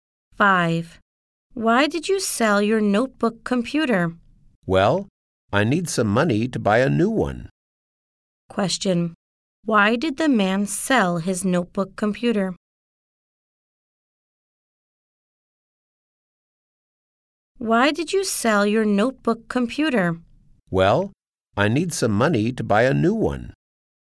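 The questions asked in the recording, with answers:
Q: Why did the man sell his notebook computer?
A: He needs money to buy a new one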